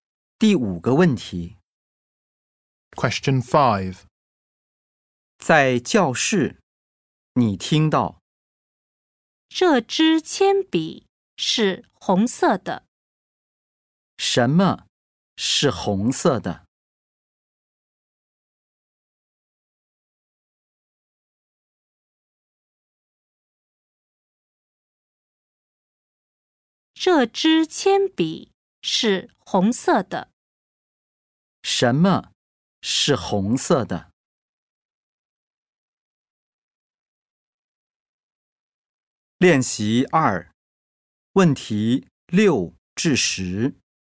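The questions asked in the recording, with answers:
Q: 什么是红色的?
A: 铅笔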